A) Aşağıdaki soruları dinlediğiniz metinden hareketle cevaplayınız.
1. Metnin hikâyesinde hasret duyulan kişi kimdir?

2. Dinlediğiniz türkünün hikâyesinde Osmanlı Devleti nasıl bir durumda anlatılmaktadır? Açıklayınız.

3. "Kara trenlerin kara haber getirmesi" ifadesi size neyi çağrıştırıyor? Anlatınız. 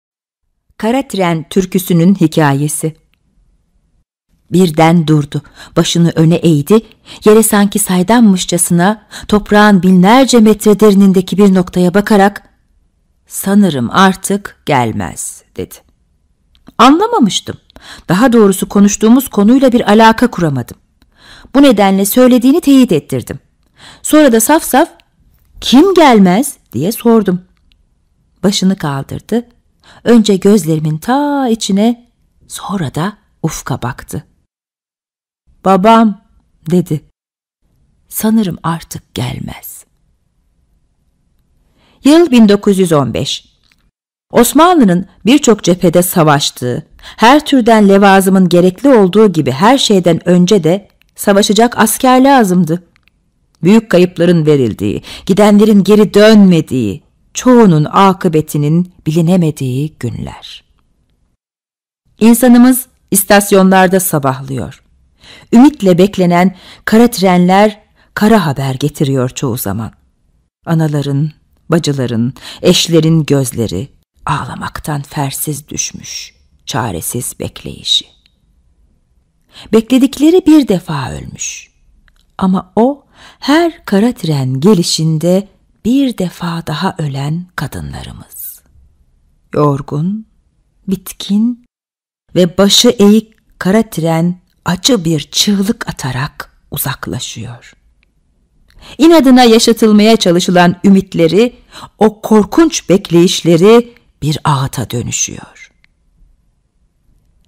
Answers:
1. Hasret duyulan kişi babadır.
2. Osmanlı Devleti birçok cephede savaşmaktaydı.
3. o kişinin şehit olduğunu anlarlardı.

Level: 6. Sınıf